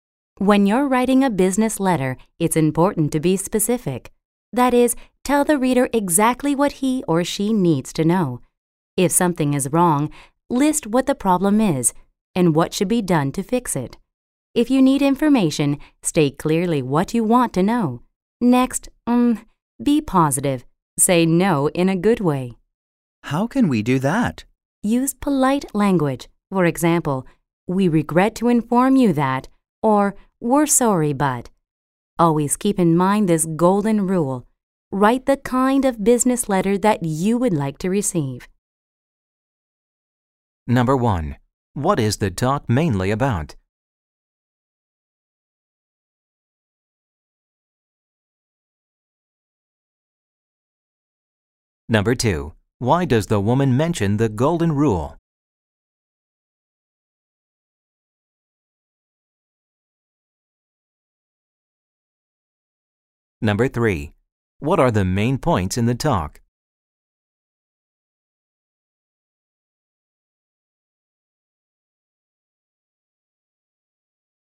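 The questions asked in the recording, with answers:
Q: What is the talk mainly about?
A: How to write a good business letter

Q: Why does the woman mention the golden rule?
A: To remind writers to write the kind of business letter they would like to receive

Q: What are the main points in the talk?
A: Be specific and be positive (use polite language)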